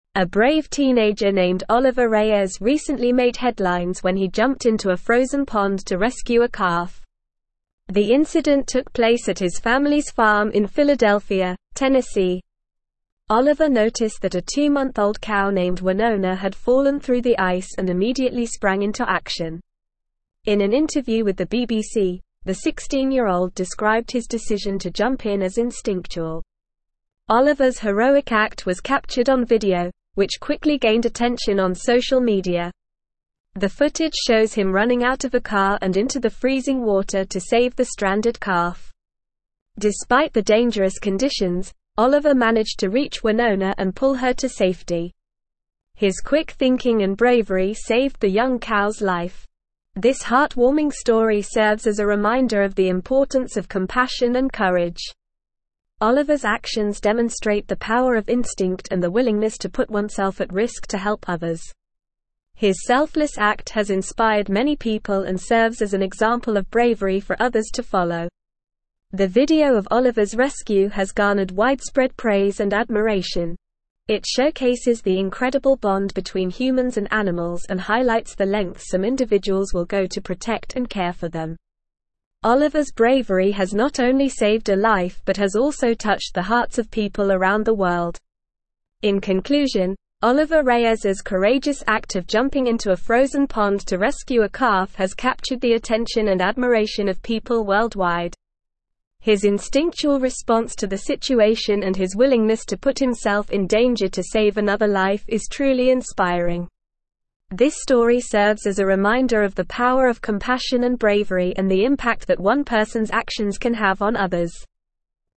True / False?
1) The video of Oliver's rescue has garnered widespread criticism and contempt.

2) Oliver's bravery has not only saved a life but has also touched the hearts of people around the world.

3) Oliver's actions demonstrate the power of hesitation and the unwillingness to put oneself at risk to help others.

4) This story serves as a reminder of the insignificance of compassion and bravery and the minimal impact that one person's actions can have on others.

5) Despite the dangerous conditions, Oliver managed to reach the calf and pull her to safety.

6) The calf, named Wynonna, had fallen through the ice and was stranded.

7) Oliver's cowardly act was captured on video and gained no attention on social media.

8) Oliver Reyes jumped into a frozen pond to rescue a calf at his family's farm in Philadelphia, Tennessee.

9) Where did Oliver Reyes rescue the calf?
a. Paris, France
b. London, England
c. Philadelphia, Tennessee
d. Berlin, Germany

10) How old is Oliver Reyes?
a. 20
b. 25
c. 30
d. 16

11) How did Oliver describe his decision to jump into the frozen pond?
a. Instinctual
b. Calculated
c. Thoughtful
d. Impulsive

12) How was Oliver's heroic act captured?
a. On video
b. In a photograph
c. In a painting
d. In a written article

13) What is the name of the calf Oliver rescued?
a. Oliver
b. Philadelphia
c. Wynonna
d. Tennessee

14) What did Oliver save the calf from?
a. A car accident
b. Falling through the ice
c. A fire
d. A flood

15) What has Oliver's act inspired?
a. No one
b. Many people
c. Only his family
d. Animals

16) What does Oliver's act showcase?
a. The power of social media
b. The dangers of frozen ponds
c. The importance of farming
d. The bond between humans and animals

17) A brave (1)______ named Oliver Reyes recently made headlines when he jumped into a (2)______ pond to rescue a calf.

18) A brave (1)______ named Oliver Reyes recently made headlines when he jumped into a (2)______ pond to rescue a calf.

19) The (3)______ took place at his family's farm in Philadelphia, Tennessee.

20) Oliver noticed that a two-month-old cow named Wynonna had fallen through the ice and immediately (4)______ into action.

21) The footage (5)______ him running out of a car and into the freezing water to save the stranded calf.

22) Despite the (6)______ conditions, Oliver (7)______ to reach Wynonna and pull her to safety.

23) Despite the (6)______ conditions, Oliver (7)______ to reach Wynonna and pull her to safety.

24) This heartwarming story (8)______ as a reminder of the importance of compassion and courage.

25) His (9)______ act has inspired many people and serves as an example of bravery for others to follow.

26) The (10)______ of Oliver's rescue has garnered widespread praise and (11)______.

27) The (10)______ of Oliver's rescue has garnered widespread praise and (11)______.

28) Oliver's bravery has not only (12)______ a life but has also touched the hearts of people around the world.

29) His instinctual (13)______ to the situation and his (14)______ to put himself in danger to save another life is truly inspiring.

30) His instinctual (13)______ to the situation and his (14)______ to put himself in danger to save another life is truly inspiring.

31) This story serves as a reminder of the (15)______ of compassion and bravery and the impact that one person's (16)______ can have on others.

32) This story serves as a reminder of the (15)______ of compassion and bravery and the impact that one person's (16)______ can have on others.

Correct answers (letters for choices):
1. False
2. True
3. False
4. False
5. True
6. True
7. False
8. True
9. c
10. d
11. a
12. a
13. c
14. b
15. b
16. d
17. teenager
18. frozen
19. incident
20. sprang
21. shows
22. dangerous
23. managed
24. serves
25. selfless
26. video
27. admiration
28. saved
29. response
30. willingness
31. power
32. actions

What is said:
A brave teenager named Oliver Reyes recently made headlines when he jumped into a frozen pond to rescue a calf. The incident took place at his family's farm in Philadelphia, Tennessee. Oliver noticed that a two-month-old cow named Wynonna had fallen through the ice and immediately sprang into action. In an interview with the BBC, the 16-year-old described his decision to jump in as instinctual.
Oliver's heroic act was captured on video, which quickly gained attention on social media. The footage shows him running out of a car and into the freezing water to save the stranded calf. Despite the dangerous conditions, Oliver managed to reach Wynonna and pull her to safety. His quick thinking and bravery saved the young cow's life.
This heartwarming story serves as a reminder of the importance of compassion and courage. Oliver's actions demonstrate the power of instinct and the willingness to put oneself at risk to help others. His selfless act has inspired many people and serves as an example of bravery for others to follow.
The video of Oliver's rescue has garnered widespread praise and admiration. It showcases the incredible bond between humans and animals and highlights the lengths some individuals will go to protect and care for them.
In conclusion, Oliver Reyes's courageous act of jumping into a frozen pond to rescue a calf has captured the attention and admiration of people worldwide. His instinctual response to the situation and his willingness to put himself in danger to save another life is truly inspiring. This story serves as a reminder of the power of compassion and bravery and the impact that one person's actions can have on others.

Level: Level 4